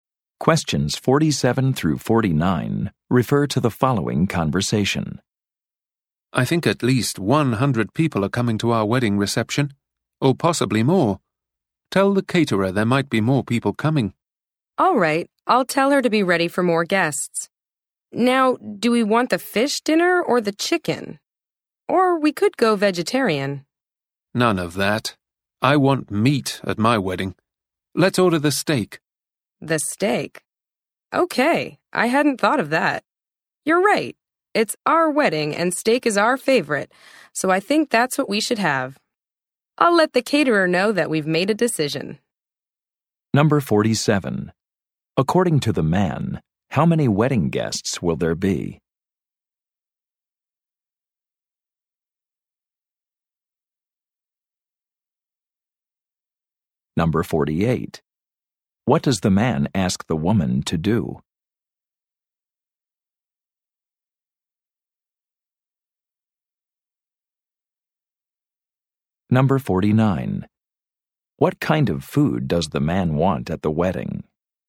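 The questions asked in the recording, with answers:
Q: According to the man, how many wedding guests will there be?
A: At least 100

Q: What does the man ask the woman to do?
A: Tell the caterer more people might come

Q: What kind of food does the man want at the wedding?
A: Steak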